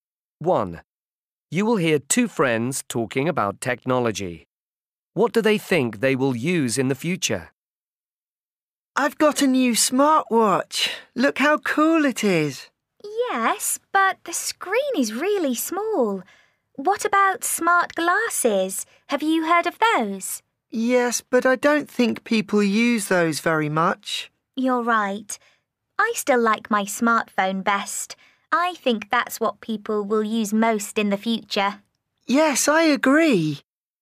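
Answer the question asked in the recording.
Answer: a smartphone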